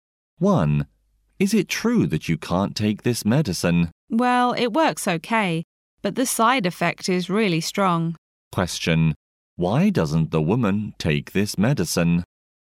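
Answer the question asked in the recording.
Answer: Its side effect is really strong.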